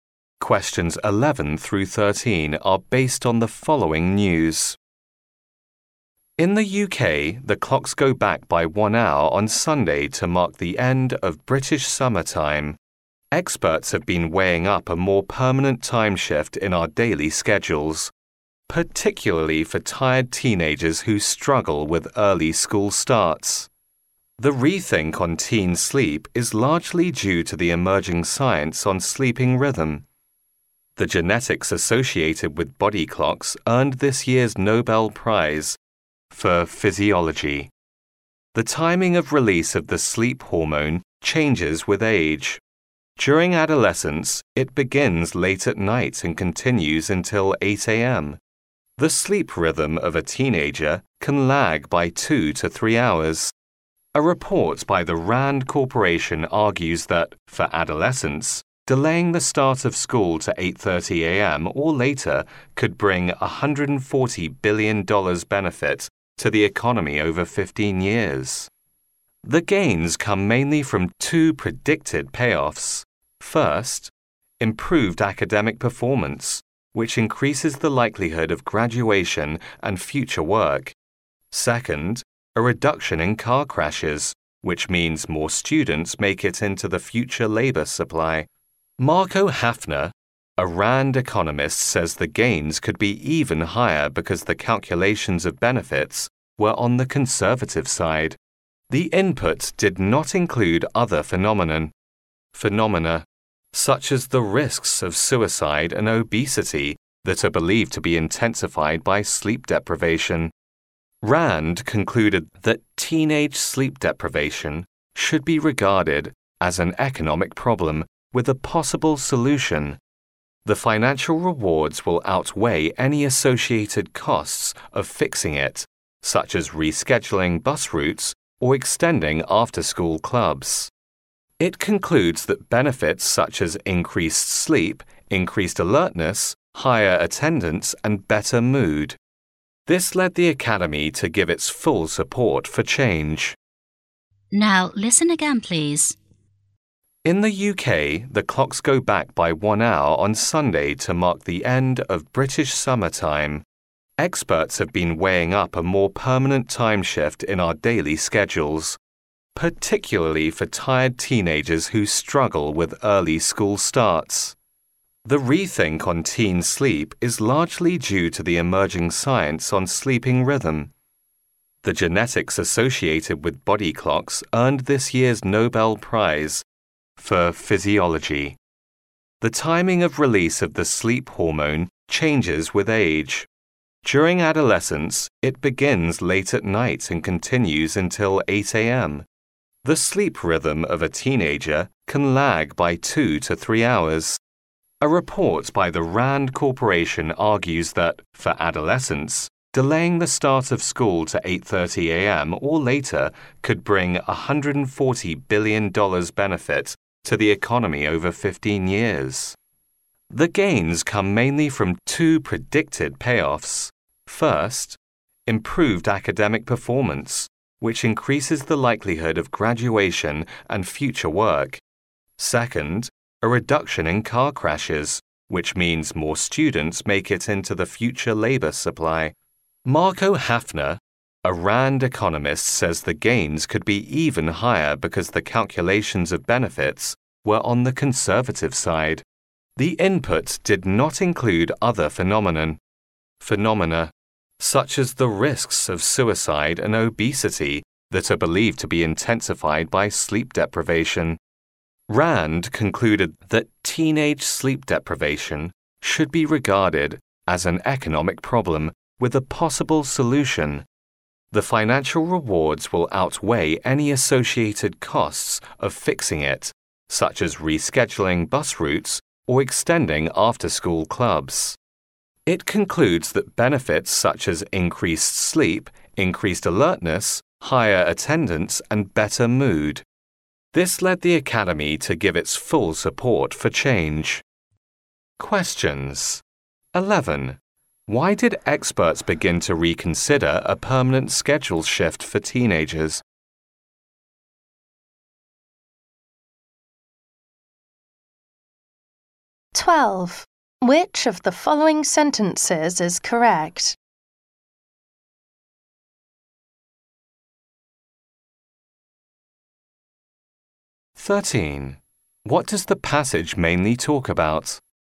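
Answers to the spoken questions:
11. Because of the emerging science on sleeping rhythm
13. The benefits of starting school later for sleep-deprived teenagers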